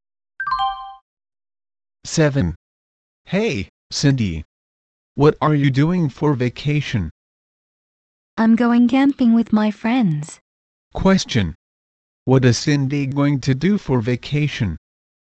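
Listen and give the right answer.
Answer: Go camping with her friends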